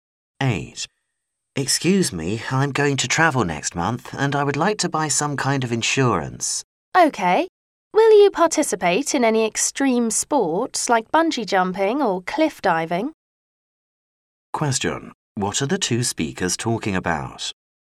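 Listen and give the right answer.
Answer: Travel insurance.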